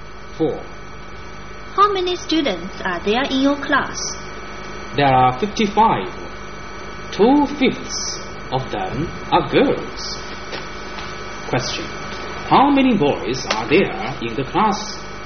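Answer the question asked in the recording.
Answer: 33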